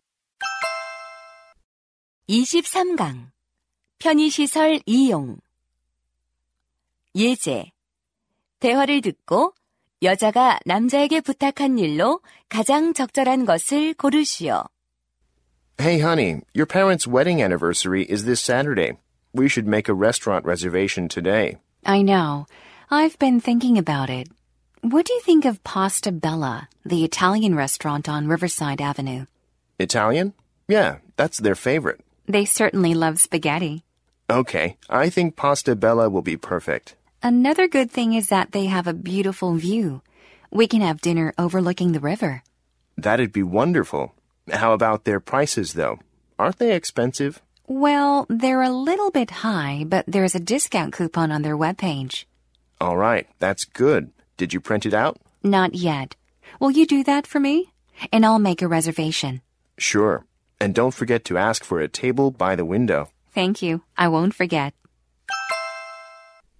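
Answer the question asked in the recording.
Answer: 할인 쿠폰 출력하기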